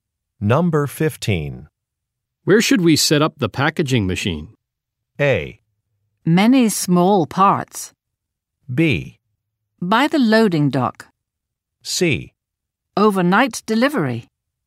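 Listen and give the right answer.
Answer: B: By the loading dock.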